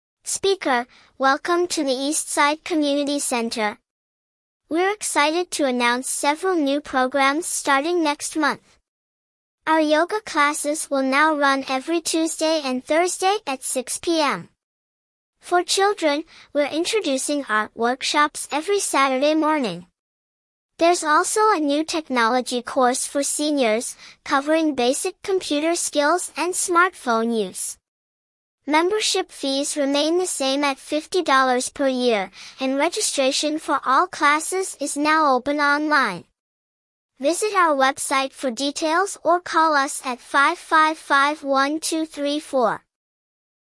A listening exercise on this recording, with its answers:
When will yoga classes take place?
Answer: Tuesday and Thursday